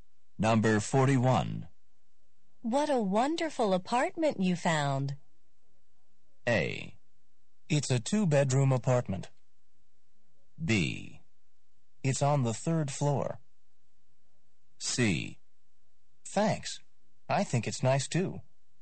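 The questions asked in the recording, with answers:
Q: What a wonderful apartment you found.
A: C: Thanks. I think it's nice, too.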